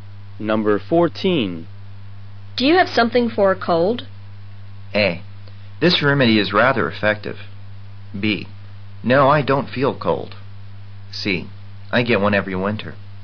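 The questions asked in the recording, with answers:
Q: Do you have something for a cold?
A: A: This remedy is rather effective.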